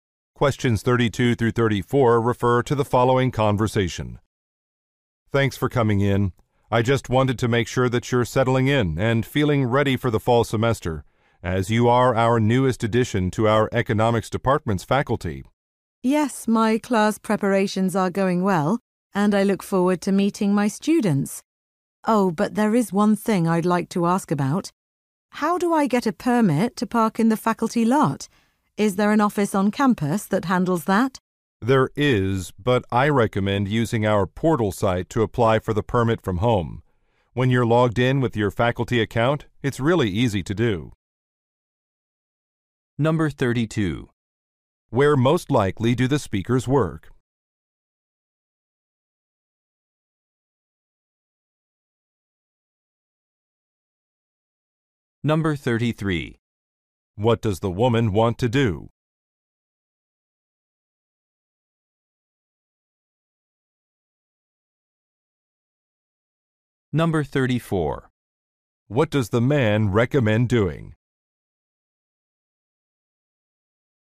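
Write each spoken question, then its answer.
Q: Where most likely do the speakers work?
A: At a university (economics department)

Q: What does the woman want to do?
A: Get a parking permit for the faculty lot

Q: What does the man recommend doing?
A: Applying for the permit online through the portal site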